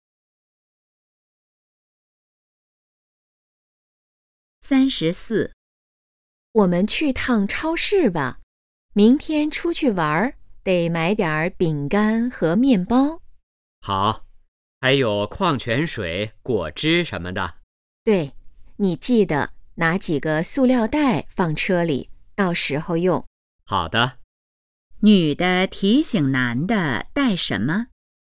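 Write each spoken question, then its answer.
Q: 女的提醒男的带什么?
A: 塑料袋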